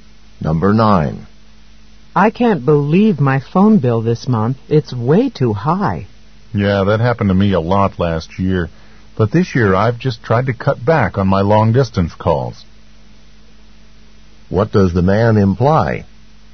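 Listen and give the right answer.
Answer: Making fewer long-distance calls will keep the bill down.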